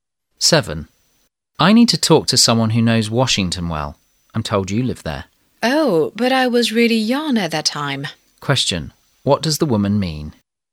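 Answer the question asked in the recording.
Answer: She doesn't know Washington well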